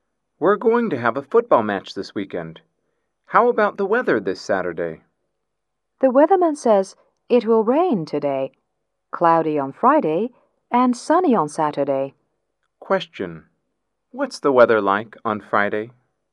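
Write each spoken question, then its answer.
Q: What's the weather like on Friday?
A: Cloudy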